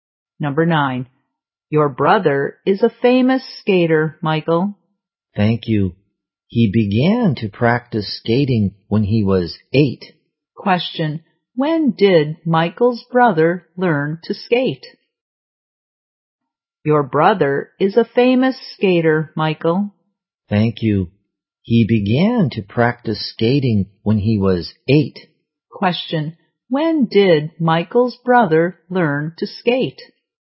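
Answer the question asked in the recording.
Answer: When he was 8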